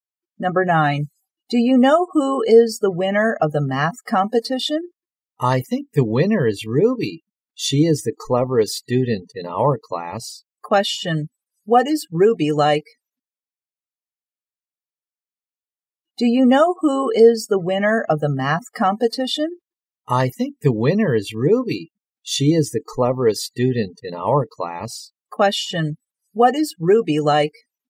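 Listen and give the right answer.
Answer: Clever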